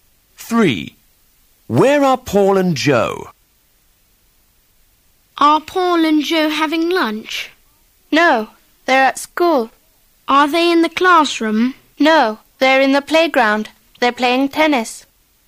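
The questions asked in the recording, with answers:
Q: Where are Paul and Joe?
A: In the playground at school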